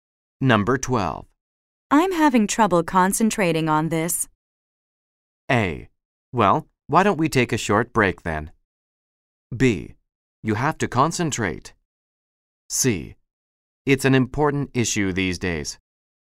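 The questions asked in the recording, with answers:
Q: I'm having trouble concentrating on this.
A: A: Well, why don't we take a short break then?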